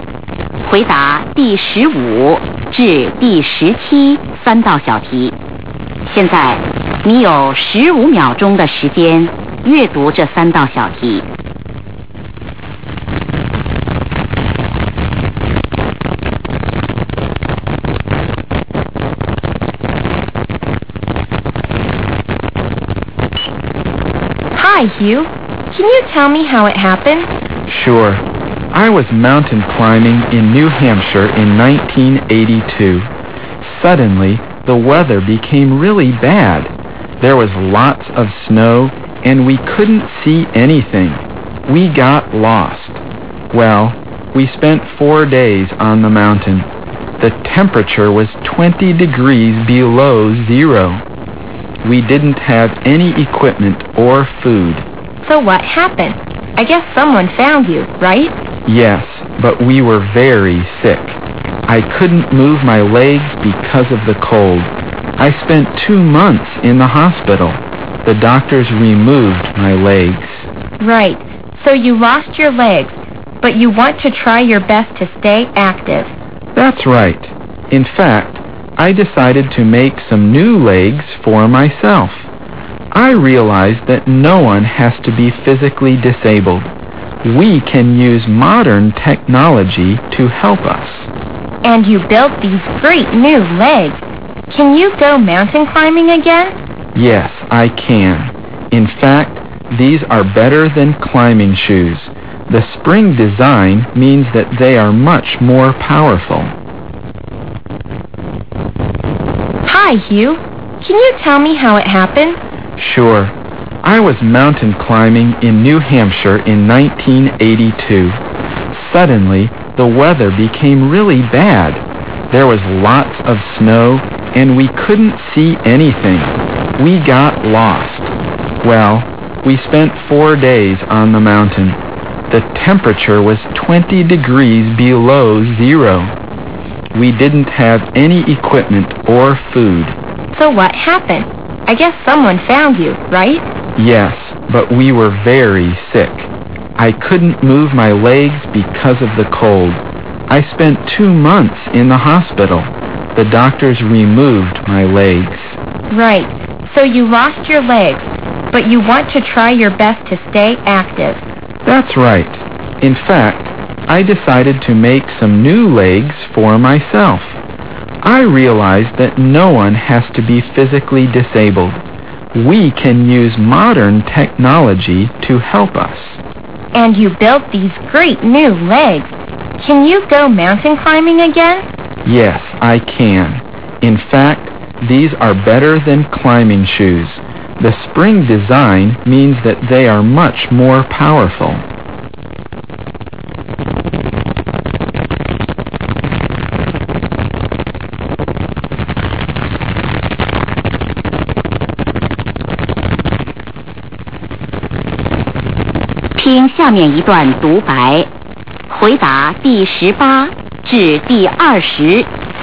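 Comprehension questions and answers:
What happened when the man was mountain climbing?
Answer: He got lost in bad weather.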